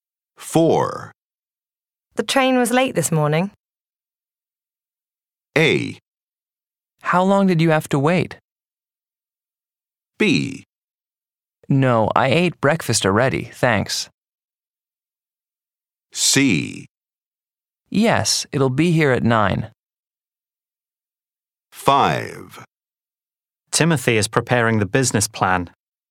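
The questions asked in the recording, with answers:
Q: The train was late this morning.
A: A: How long did you have to wait?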